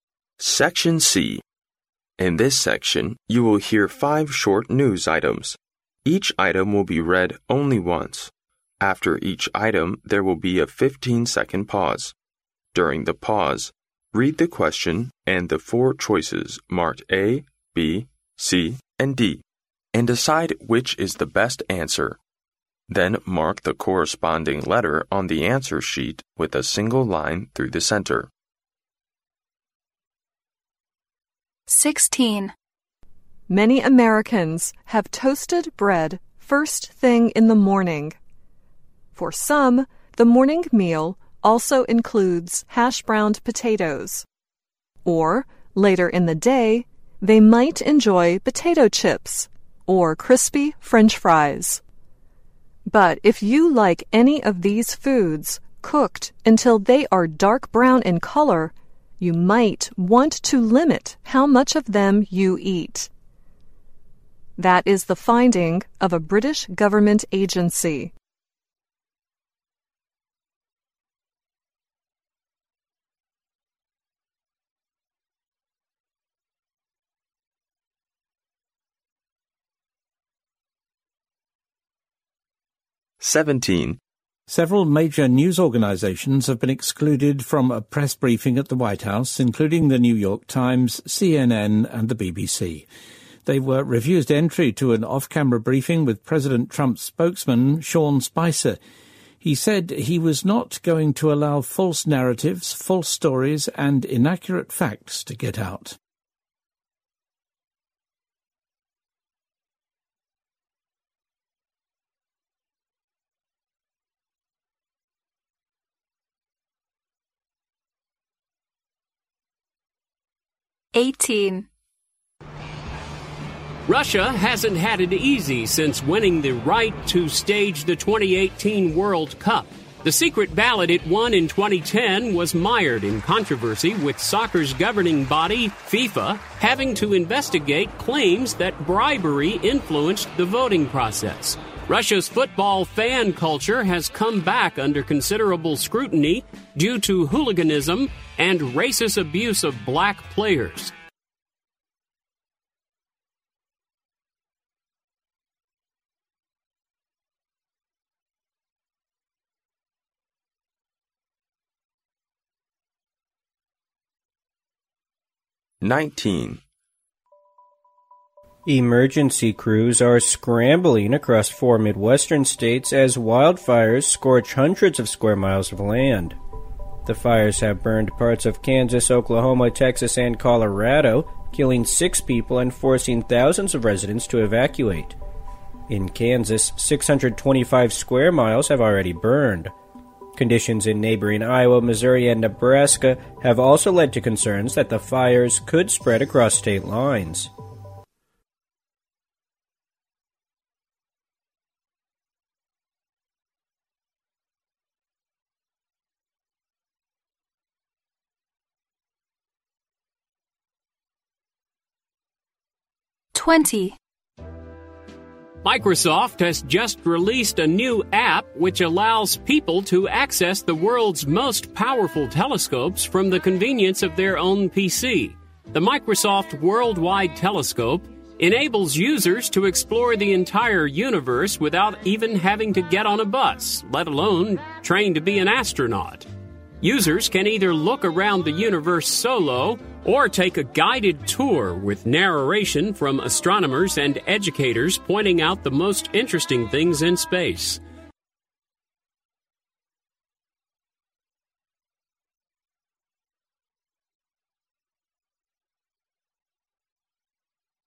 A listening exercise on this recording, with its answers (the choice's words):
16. What is true according to the British government agency?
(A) Potatoes are more nutritious than rice.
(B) Toasted bread is healthy food for breakfast.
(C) Eating hash browned potatoes too much may be harmful.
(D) It is necessary to limit the consumption of sea food.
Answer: Eating hash browned potatoes too much may be harmful.

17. What happened to some major news organizations?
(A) They were accused of using inaccurate facts in their news reports.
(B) They protested against President Trump's new policy on employment.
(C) They had a heated argument with President Trump's spokesman.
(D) They were refused entry to a press briefing at the White House.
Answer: They were refused entry to a press briefing at the White House.

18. What do we learn from the news item?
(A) The World Cup has given rise to a football fan culture all over the world.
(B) Russia might win the right to host the 2018 World Cup by illegal means.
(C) There was controversy among Russians over whether to host a World Cup.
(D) It wasn't easy for Russia to win the right to host the 2018 World Cup.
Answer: Russia might win the right to host the 2018 World Cup by illegal means.

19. What is hitting parts of America?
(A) Wildfires.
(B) An earthquake.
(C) Huge floods.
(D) A snowstorm.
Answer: Wildfires.

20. What is the function of the new Microsoft app?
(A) Showing people how astronauts do research in space.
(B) Providing space enthusiasts with a virtual universe.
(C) Allowing users to explore the universe on their own PC.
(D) Explaining how the world's most powerful telescopes work.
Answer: Allowing users to explore the universe on their own PC.

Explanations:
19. 新闻开头提到"Emergency crews are scrambling across four mid-western states as wildfires scorch hundreds of square miles of land."由此可知野火正在袭击美国部分地区。故选A。